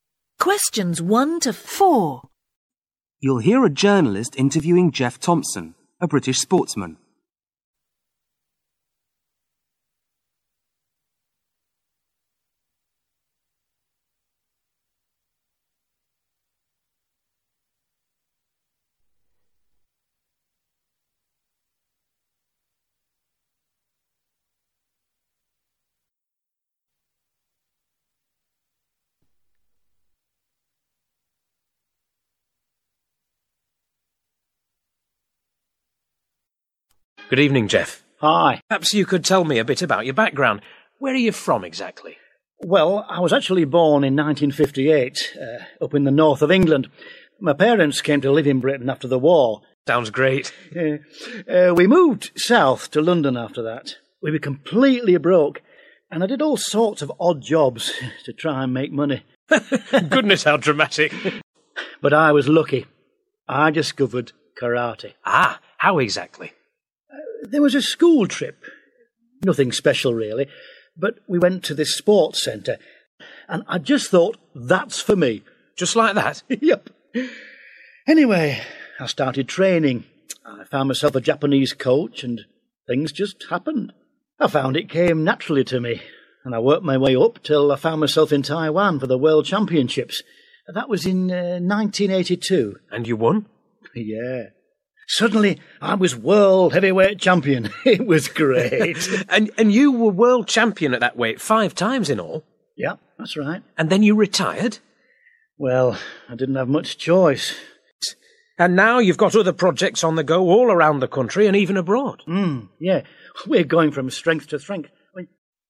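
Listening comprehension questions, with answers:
Where was Geoff Thompson born?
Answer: In the North of England.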